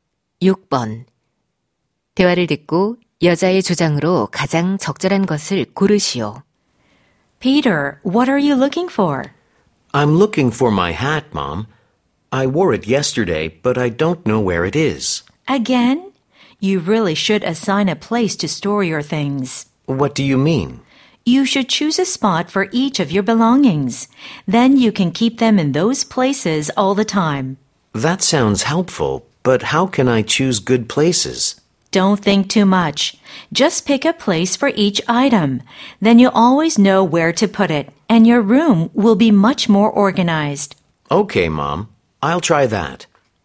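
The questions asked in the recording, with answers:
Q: 대화를 듣고 여자의 주장으로 가장 적절한 것을 고르시오.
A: 물건마다 보관 장소를 정해 두어야 한다.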